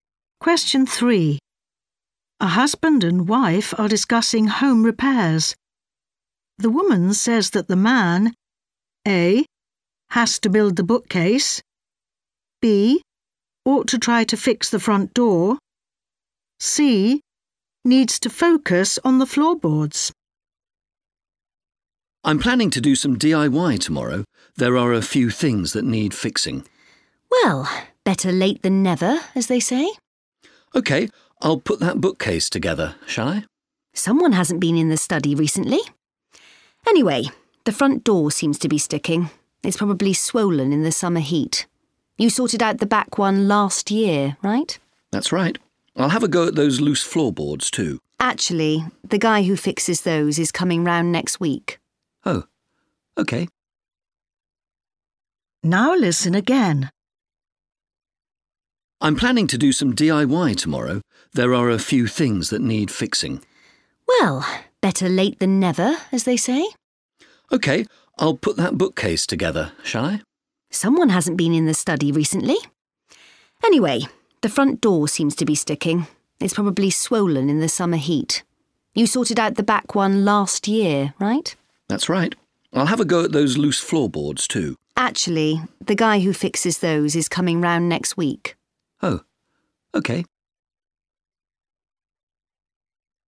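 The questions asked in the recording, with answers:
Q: The woman says that the man A.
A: B: ought to try to fix the front door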